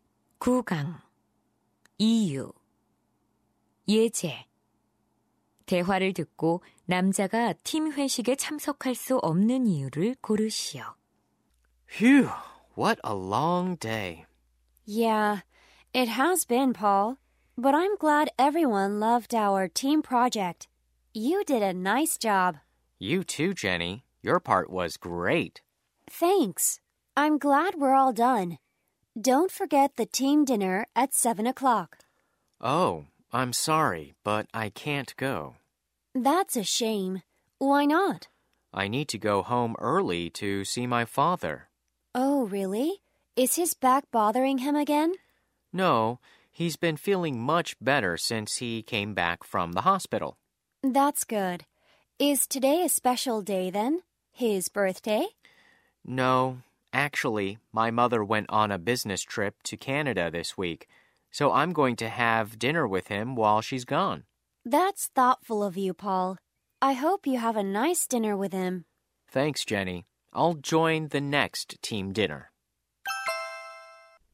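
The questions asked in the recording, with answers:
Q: 대화를 듣고 남자가 팀 회식에 참석할 수 없는 이유를 고르시오.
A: 어머니가 출장 중이라 아버지와 저녁을 먹어야 해서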